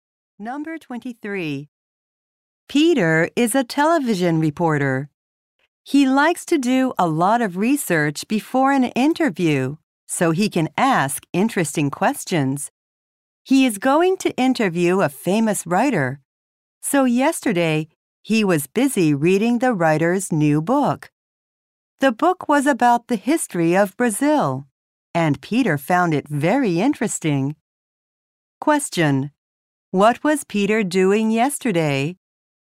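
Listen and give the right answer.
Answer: Reading the writer's new book.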